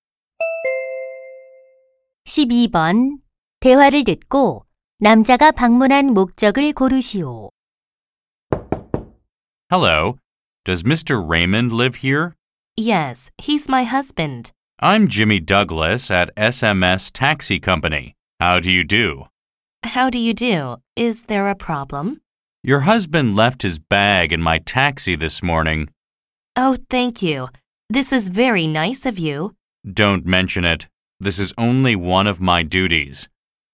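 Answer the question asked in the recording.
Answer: 택시에 두고 내린 가방을 돌려주려고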